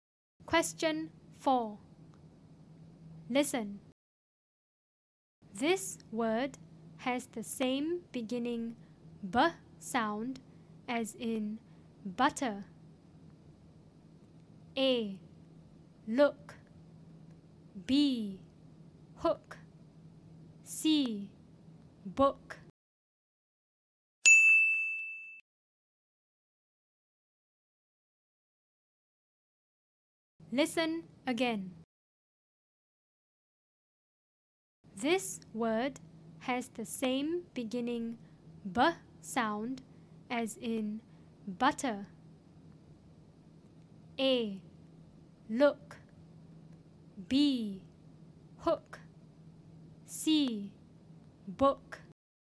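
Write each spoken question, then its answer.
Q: This word has the same beginning b sound as in butter.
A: C: Book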